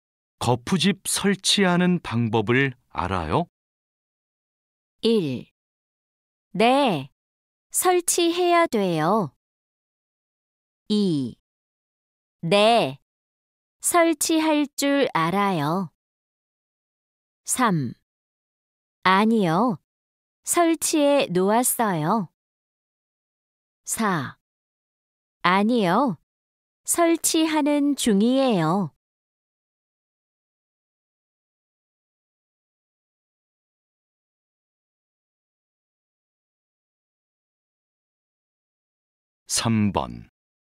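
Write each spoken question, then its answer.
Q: 거푸집 설치하는 방법을 알아요?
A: 2: 네, 설치할 줄 알아요.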